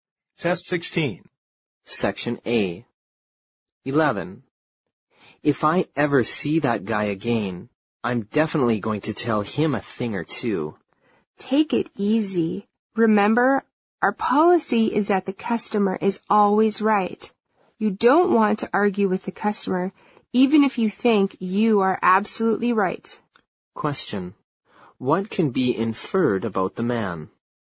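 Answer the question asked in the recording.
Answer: He is angry with a customer and wants to confront him.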